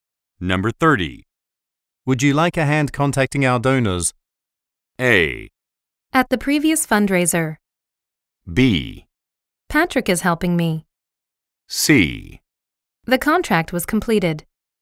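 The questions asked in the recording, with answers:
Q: Would you like a hand contacting our donors?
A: B: Patrick is helping me.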